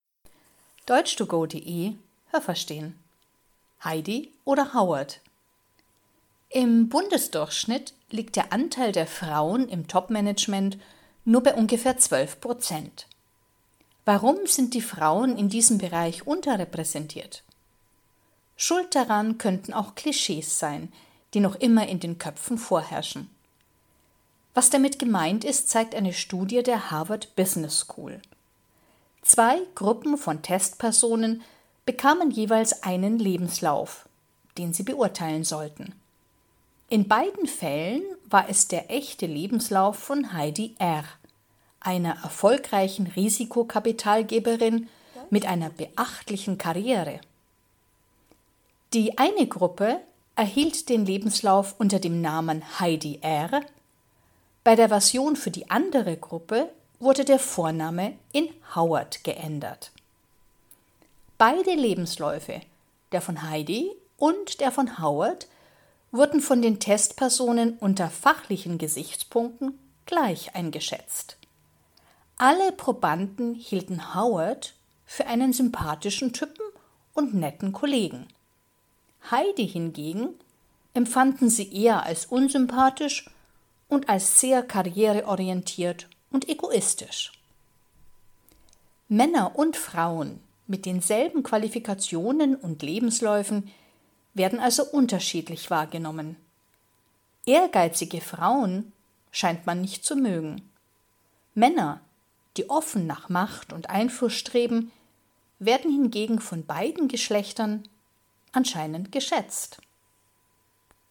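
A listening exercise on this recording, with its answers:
Was haben Sie gehört? Es gibt nur eine korrekte Antwort.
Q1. Circa 12 Prozent der Frauen sind _____ im Top-Management.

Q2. Die zwei Gruppen von Probanden hatten die Aufgabe, einen Lebenslauf ...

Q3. Jede Gruppe bekam ...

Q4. Der Lebenslauf war ...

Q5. Der echte Lebenslauf war ...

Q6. Einer Gruppe sagte man, dass das der Lebenslauf von Heidi R. ist. Der anderen Gruppe sagte man, ...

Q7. Den Lebenslauf der Frau fanden alle Testpersonen fachlich _____ wie den Lebenslauf des Mannes.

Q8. Den Mann fanden alle Probanden ...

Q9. Die Frau fanden die Probanden tendenziell ...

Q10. Wer wird von beiden Geschlechtern anscheinend mehr geschätzt?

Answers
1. vertreten (nur ungefähr 12 % Anteil)
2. zu beurteilen
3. einen Lebenslauf
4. in beiden Fällen derselbe, der echte Lebenslauf von Heidi R.
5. der von Heidi R., einer erfolgreichen Risikokapitalgeberin
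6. dass es der Lebenslauf von Howard ist
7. genauso gut
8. sympathisch und einen netten Kollegen
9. unsympathisch, karriereorientiert und egoistisch
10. Männer, die offen nach Macht und Einfluss streben

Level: C (schwer)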